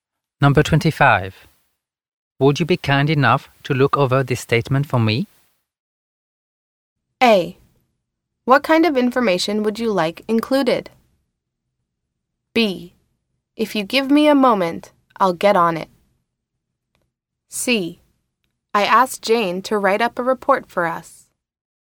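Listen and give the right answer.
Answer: B: If you give me a moment, I'll get on it.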